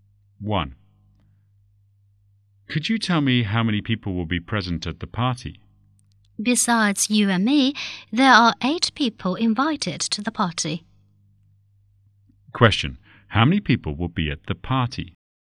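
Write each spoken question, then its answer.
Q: How many people will be at the party?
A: 10 people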